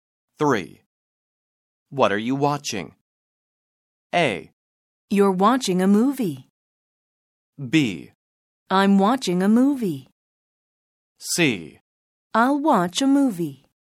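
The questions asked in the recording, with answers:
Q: What are you watching?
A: B: I'm watching a movie.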